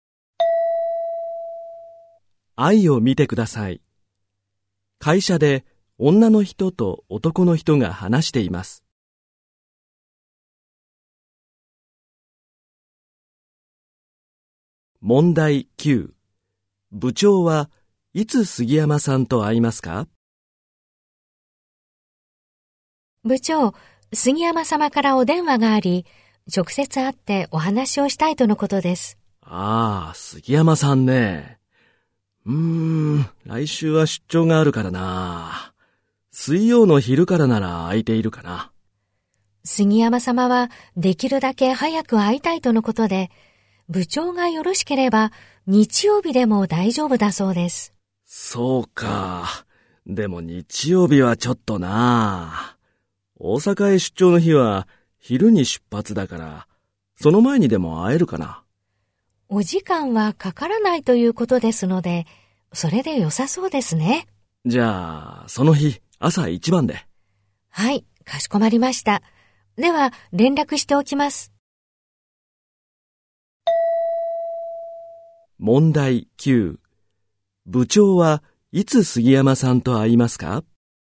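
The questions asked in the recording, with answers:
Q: 部長はいつ杉山さんと会いますか?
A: 大阪へ出張する日の朝一番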